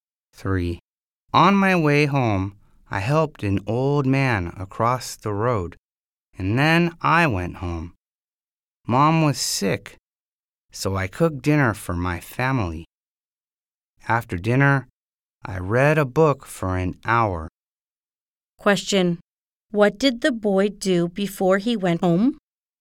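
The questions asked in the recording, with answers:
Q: What did the boy do before he went home?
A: He helped an old man across the road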